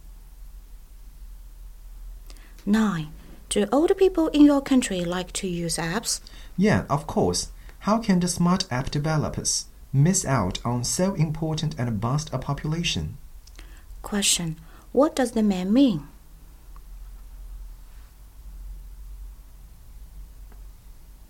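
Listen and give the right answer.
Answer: Older people are an important market for app developers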